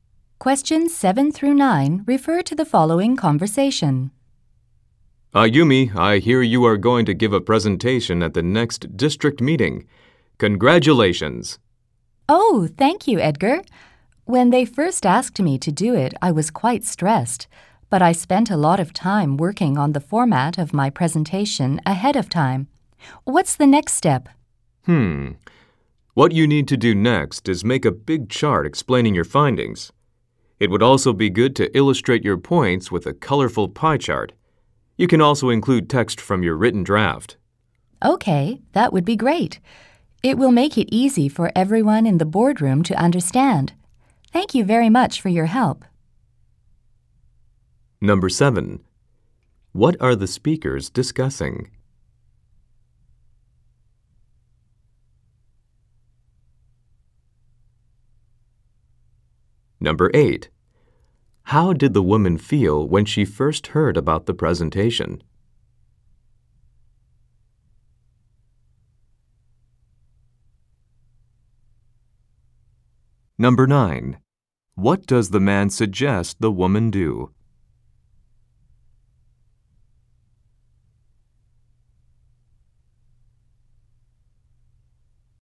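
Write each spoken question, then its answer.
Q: What are the speakers discussing?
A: The woman's presentation at the next district meeting

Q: How did the woman feel when she first heard about the presentation?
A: Quite stressed

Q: What does the man suggest the woman do?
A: Make a big chart explaining her findings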